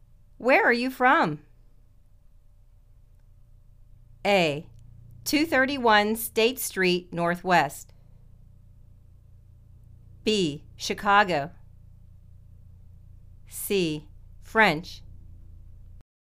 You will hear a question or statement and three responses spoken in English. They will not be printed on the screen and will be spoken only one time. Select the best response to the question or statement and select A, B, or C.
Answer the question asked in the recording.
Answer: Chicago